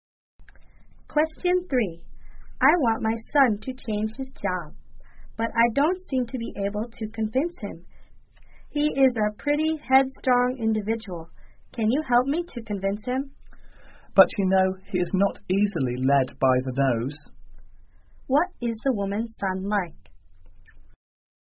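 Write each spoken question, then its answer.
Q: What is the woman's son like?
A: Headstrong and not easily persuaded.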